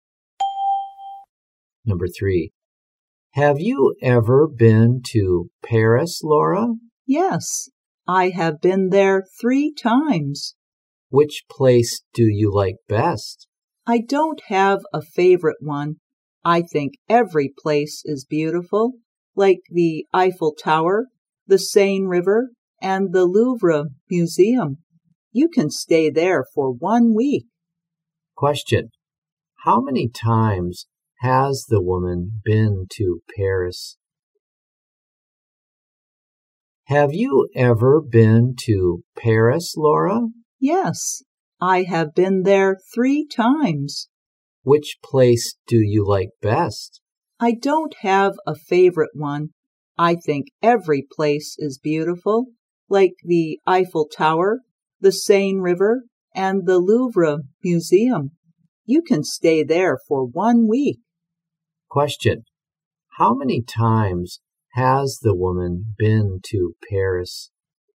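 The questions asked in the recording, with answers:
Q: How many times has the woman been to Paris?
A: 3 times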